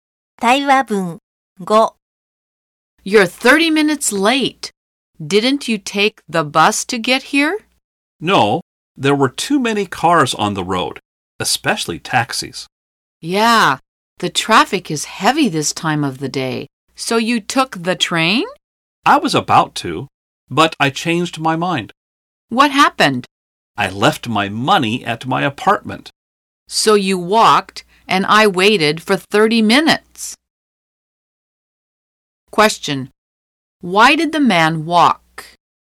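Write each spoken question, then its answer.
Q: Why did the man walk?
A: He left his money at his apartment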